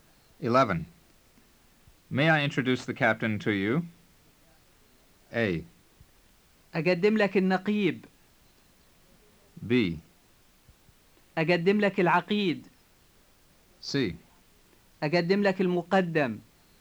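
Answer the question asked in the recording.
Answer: A: أقدم لك النقيب.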